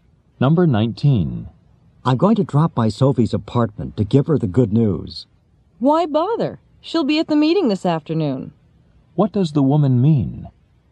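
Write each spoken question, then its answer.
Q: What does the woman mean?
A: He doesn't need to go to Sophie's apartment because he can tell her at the meeting.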